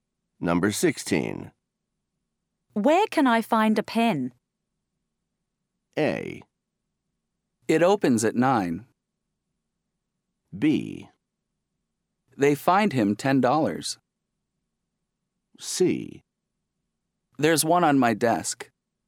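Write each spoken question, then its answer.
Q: Where can I find a pen?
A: C: There's one on my desk.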